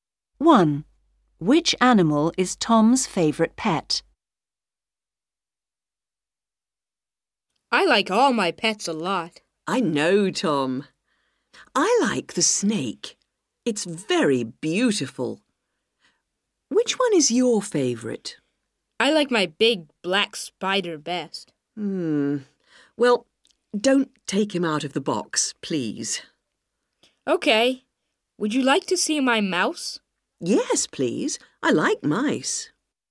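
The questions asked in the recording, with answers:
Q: Which animal is Tom's favorite pet?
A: his big black spider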